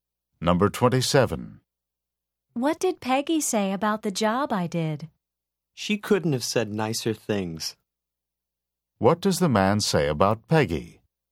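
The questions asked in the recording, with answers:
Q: What does the man say about Peggy?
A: She praised the job very highly.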